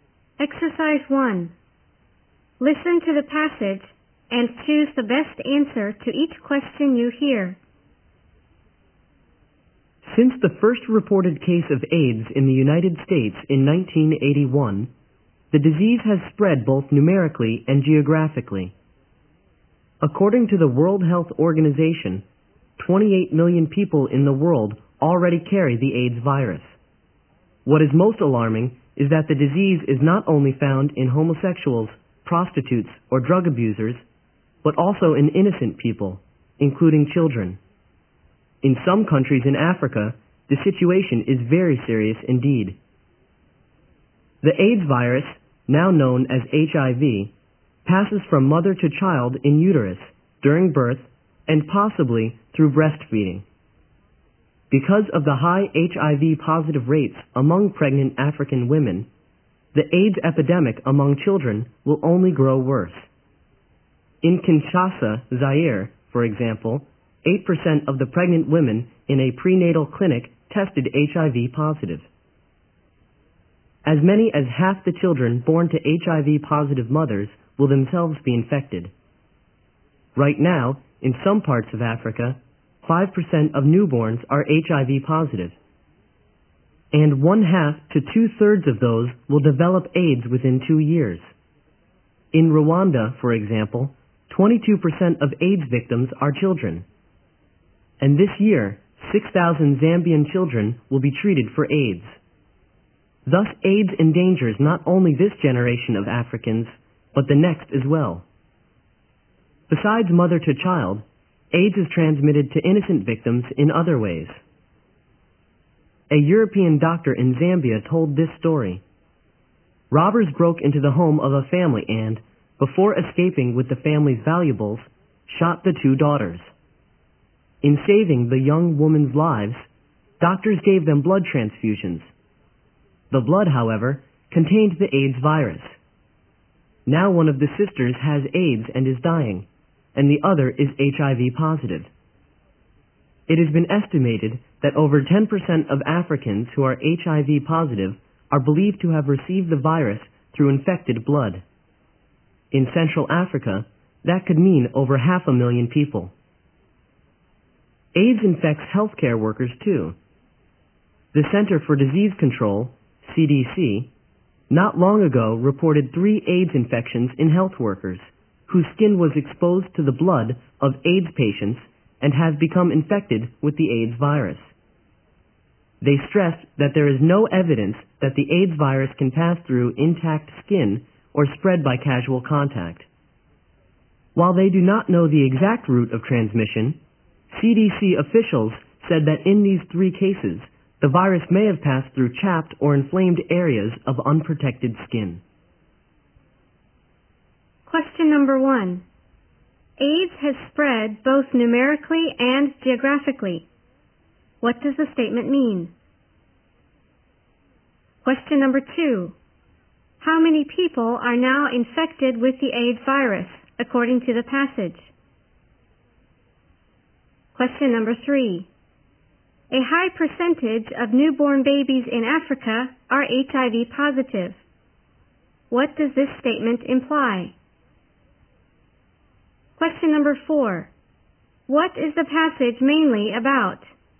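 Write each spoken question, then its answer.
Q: How many people are now infected with the AIDS virus, according to the passage?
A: 28 million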